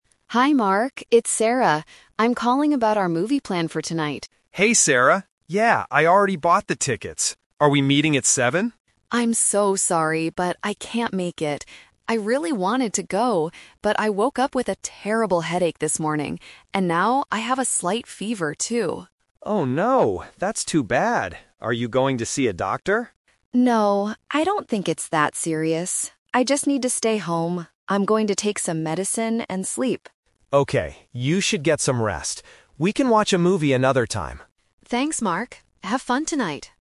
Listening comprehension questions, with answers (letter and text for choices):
Listen to a phone conversation between two friends. Choose the correct answer (A, B, or C) for each question.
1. Why is Sarah calling Mark?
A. To ask him to buy the movie tickets.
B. To tell him she cannot go to the movie.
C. To invite him to go to the hospital with her.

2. How does Sarah feel?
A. She is very tired from working all day.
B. She has a bad stomachache and feels cold.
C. She has a terrible headache and a fever.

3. What does Sarah plan to do tonight?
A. Go to the doctor.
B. Take medicine and sleep.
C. Watch a movie at home.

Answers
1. B. To tell him she cannot go to the movie.
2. C. She has a terrible headache and a fever.
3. B. Take medicine and sleep.

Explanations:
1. Sarah calls Mark to say, "I'm so sorry, but I can't make it" (meaning she cannot go to the movie).
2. Sarah explicitly states her symptoms: "I woke up with a terrible headache... And now, I have a slight fever."
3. Sarah says, "I'm going to take some medicine and sleep."

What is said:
Sarah: Hi, Mark. It's Sarah. I'm calling about our movie plan for tonight.
Mark: Hey Sarah! Yeah, I already bought the tickets. Are we meeting at seven?
Sarah: I'm so sorry, but I can't make it. I really wanted to go, but I woke up with a terrible headache this morning. And now, I have a slight fever, too.
Mark: Oh no, that's too bad. Are you going to see a doctor?
Sarah: No, I don't think it's that serious. I just need to stay home. I'm going to take some medicine and sleep.
Mark: Okay, you should get some rest. We can watch a movie another time.